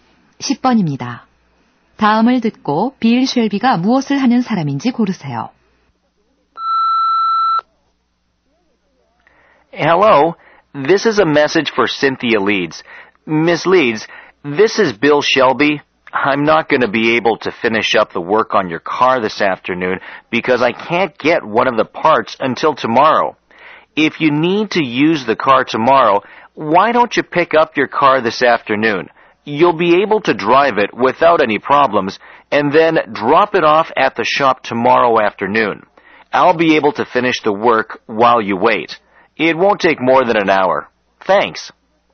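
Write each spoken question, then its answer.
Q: 다음을 듣고 빌 쉘비가 무엇을 하는 사람인지 고르세요.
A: 자동차 정비사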